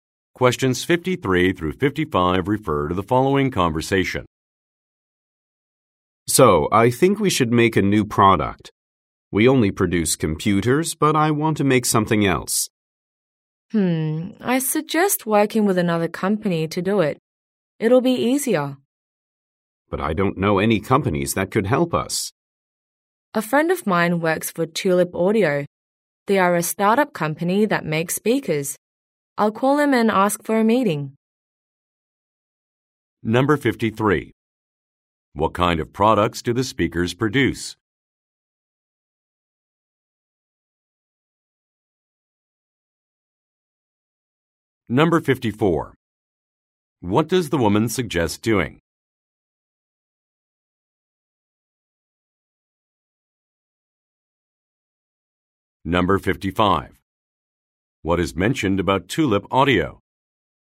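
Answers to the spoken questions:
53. Computers
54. Working with another company
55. It is a startup that makes speakers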